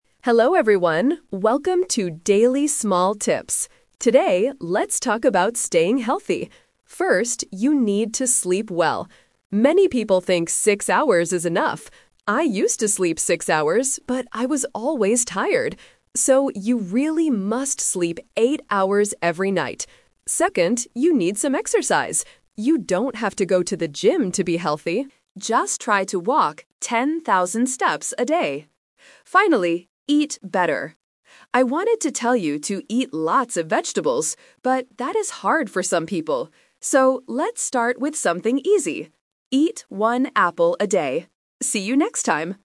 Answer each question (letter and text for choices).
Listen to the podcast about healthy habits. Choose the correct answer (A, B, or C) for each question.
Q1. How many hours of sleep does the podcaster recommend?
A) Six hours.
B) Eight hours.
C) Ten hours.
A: B) Eight hours.

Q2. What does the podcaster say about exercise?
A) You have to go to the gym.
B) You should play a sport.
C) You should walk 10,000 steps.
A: C) You should walk 10,000 steps.

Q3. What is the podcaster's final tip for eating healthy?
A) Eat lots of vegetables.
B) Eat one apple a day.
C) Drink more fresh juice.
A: B) Eat one apple a day.

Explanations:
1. The podcaster clearly advises, "So, you really must sleep eight hours every night." Option (A) is a trap; the speaker used to sleep six hours, but mentions that it made him tired. Option (C) is a plausible amount of sleep but is never mentioned.
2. The speaker says, "Just try to walk ten thousand steps a day." Option (A) is a trap; he specifically says, "You don't have to go to the gym". Option (B) is a plausible way to exercise, but it is not mentioned in the audio.
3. At the end, the podcaster suggests: "let's start with something easy: eat one apple a day." Option (A) is a trap; he wanted to tell people to eat vegetables, but changed his mind because it is too hard for some people. Option (C) is a healthy habit but is not mentioned.

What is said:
Podcaster: Hello everyone, welcome to 'Daily Small Tips'. Today, let's talk about staying healthy. First, you need to sleep well. Many people think six hours is enough. I used to sleep six hours, but I was always tired. So, you really must sleep eight hours every night. Second, you need some exercise. You don't have to go to the gym to be healthy. Just try to walk ten thousand steps a day. Finally, eat better! I wanted to tell you to eat lots of vegetables, but that is hard for some people. So, let's start with something easy: eat one apple a day. See you next time!

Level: A2